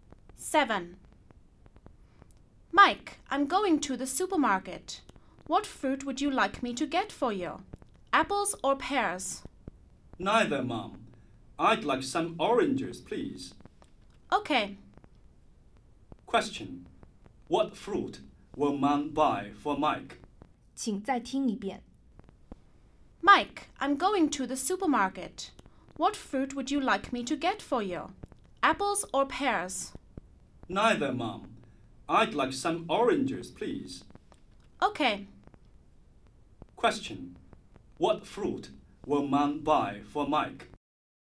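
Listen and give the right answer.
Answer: Oranges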